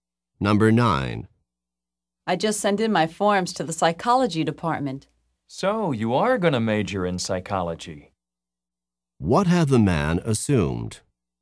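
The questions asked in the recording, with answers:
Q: What had the man assumed?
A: That the woman is going to major in psychology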